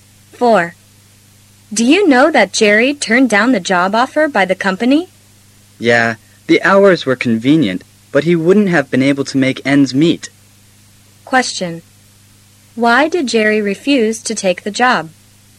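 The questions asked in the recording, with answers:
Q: Why did Jerry refuse to take the job?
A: The pay was too low to live on.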